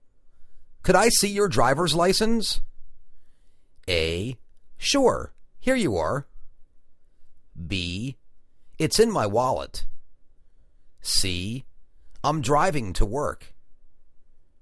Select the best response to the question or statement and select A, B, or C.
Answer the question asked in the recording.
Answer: Sure, here you are.